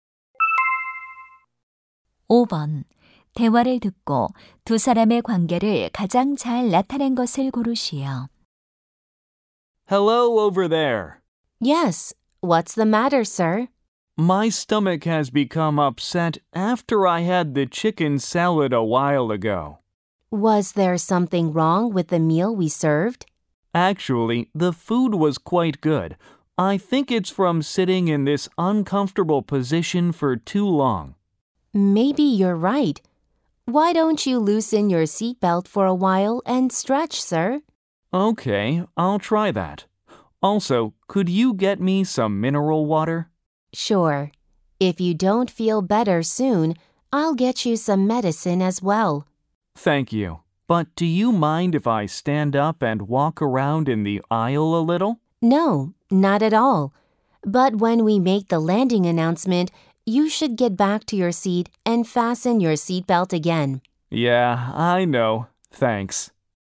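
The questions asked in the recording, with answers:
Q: 대화를 듣고 두 사람의 관계를 가장 잘 나타낸 것을 고르시오.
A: 승객 - 승무원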